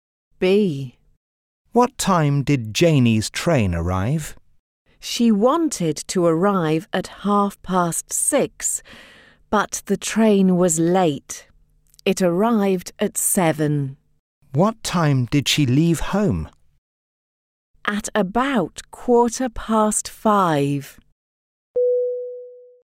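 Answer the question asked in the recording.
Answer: At 7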